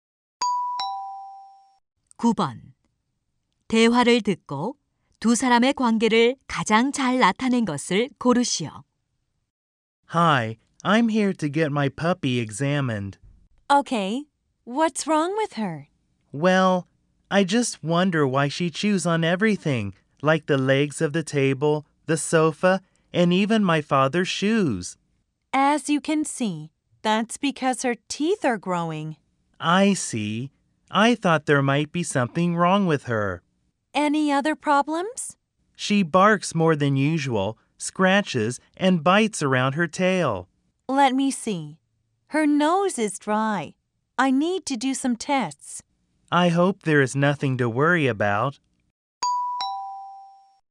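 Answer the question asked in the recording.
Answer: 수의사 - 반려견 주인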